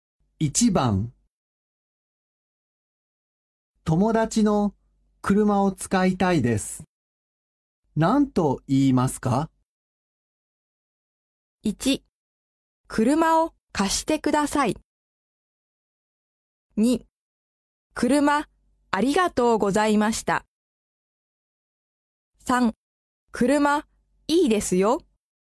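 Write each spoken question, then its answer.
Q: 友達の車を使いたいです。何と言いますか?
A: 1: 車を貸してください。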